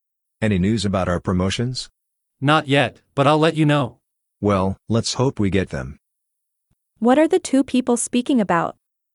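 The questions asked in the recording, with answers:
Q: What are the two people speaking about?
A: Their promotions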